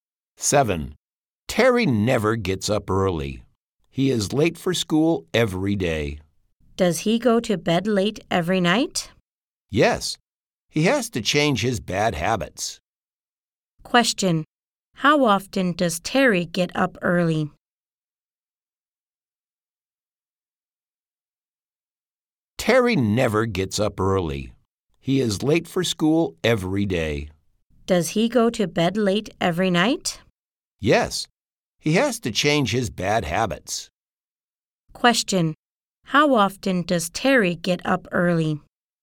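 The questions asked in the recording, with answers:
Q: Question.How often does Terry get up early?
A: Never.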